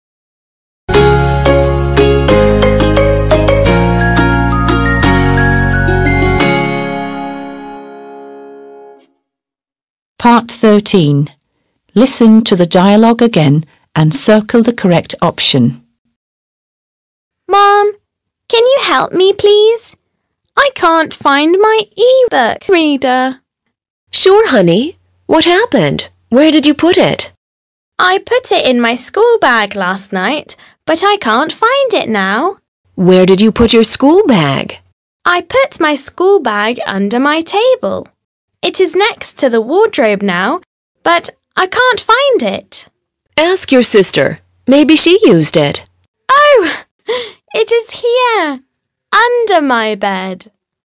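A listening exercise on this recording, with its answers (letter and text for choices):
13. Listen to the dialogue again and circle the correct option.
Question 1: Nancy: "Mom! Can you help me, please? I can't find my e-book reader/laptop."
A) e-book reader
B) laptop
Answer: A) e-book reader

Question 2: Nancy: "I put it in my schoolbag/bookshelf last night, but I can't find it now."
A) schoolbag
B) bookshelf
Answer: A) schoolbag

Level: 6. Sınıf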